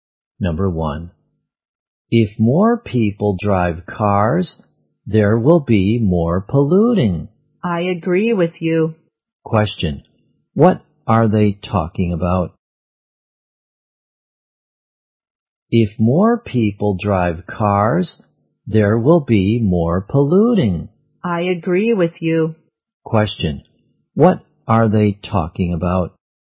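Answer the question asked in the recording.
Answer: Pollution caused by driving cars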